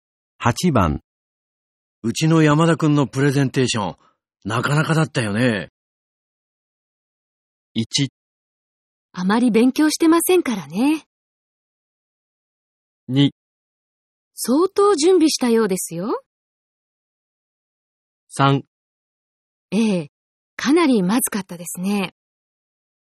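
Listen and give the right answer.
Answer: 2: 相当準備したようですよ。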